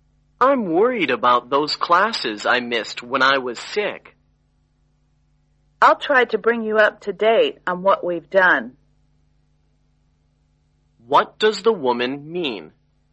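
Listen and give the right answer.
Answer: She will help him catch up on the classes he missed.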